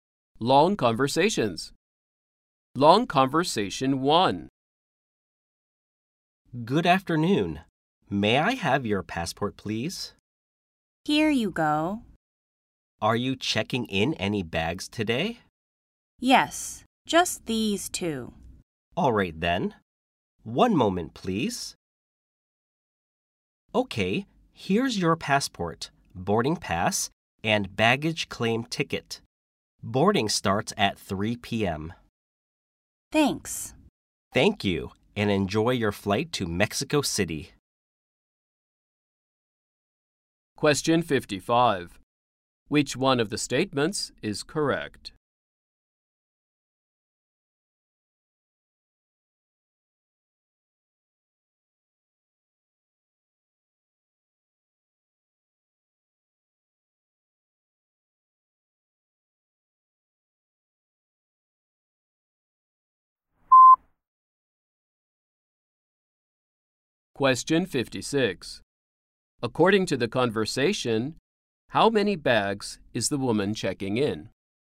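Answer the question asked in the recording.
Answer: Two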